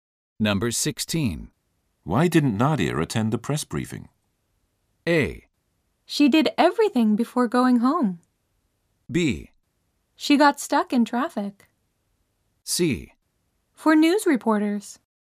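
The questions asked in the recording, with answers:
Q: Why didn't Nadia attend the press briefing?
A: B: She got stuck in traffic.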